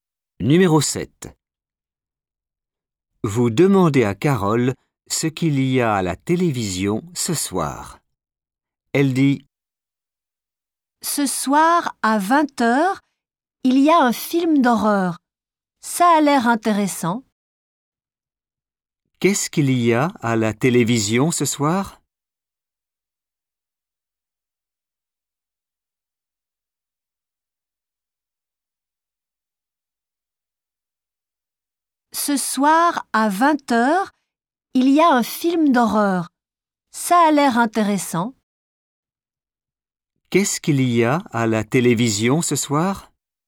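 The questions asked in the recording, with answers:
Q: Qu'est-ce qu'il y a à la télévision ce soir ?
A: un film d'horreur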